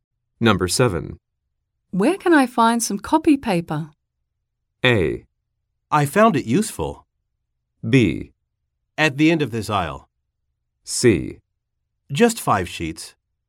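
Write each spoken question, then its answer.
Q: Where can I find some copy paper?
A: B: At the end of this aisle.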